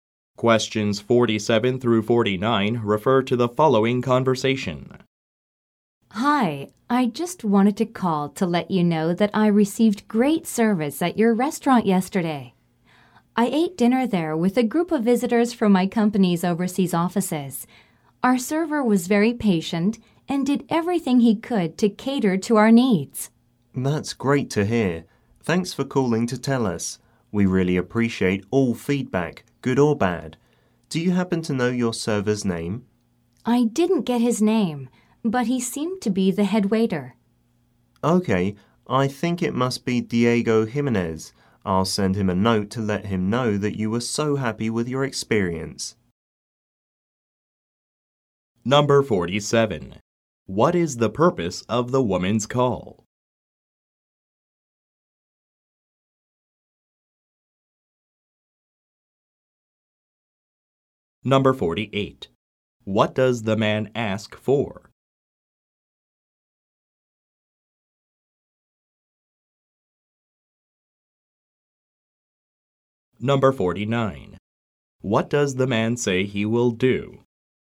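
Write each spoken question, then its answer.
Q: What is the purpose of the woman's call?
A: To praise the service she received at the restaurant

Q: What does the man ask for?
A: The server's name

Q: What does the man say he will do?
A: Send the server a note about her positive feedback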